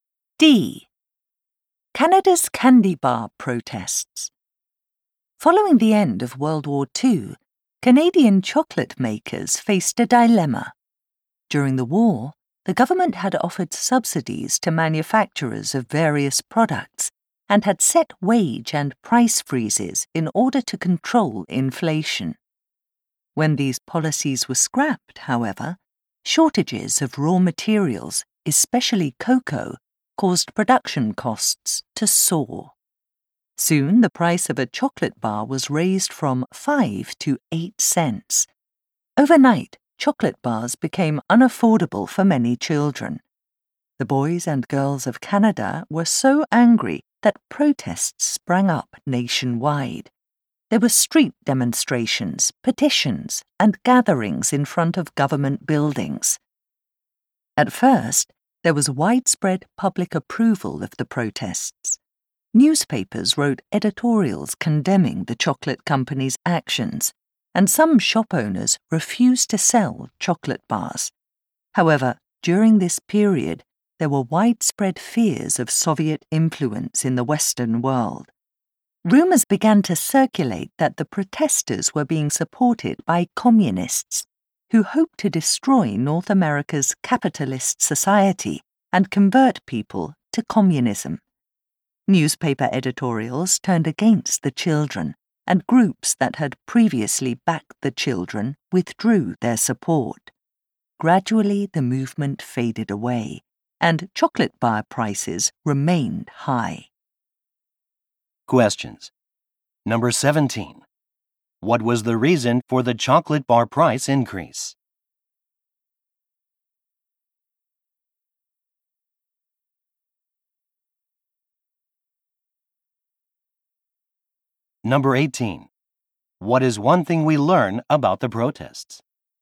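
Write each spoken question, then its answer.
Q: What was the reason for the chocolate bar price increase?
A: Production costs went up because raw materials, especially cocoa, were in short supply.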